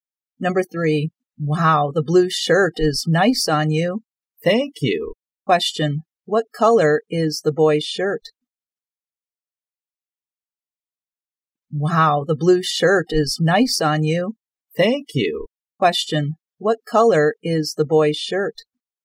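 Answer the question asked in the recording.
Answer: Blue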